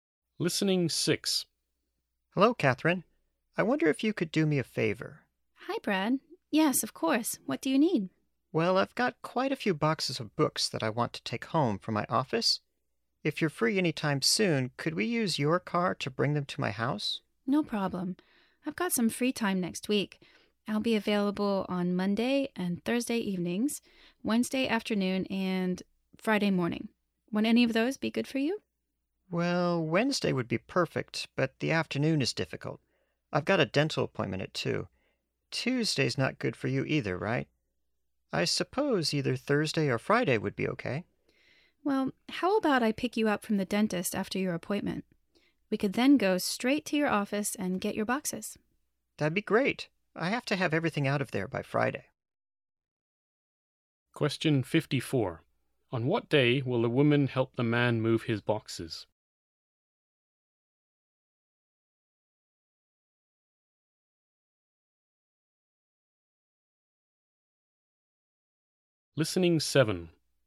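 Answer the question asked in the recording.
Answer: Wednesday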